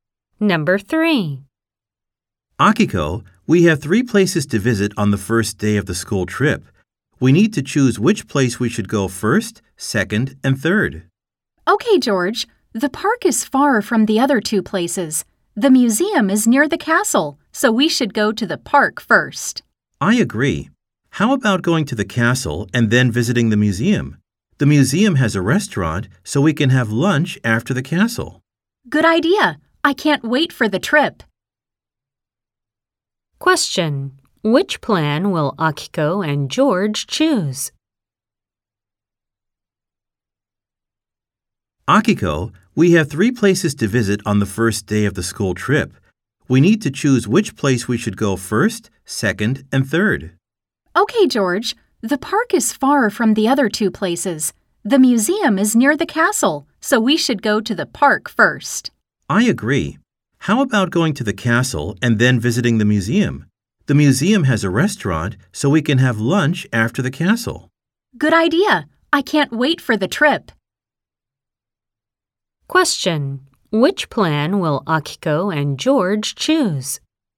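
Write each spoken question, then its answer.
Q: Which plan will Akiko and George choose?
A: The park first, then the castle, then the museum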